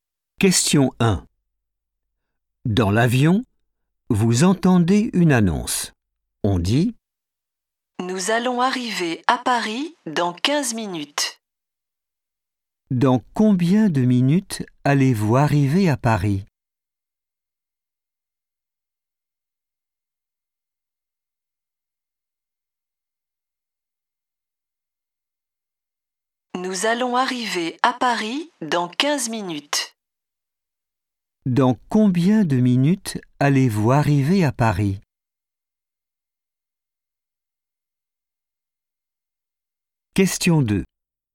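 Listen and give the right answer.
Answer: 15 minutes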